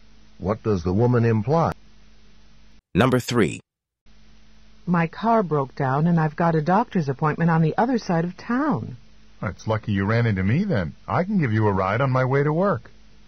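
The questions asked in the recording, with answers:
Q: What does the man offer to do?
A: Give the woman a ride to her doctor's appointment.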